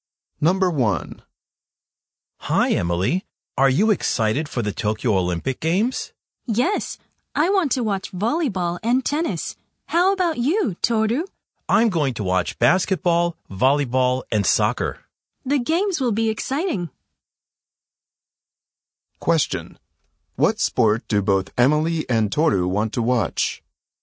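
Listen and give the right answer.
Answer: Volleyball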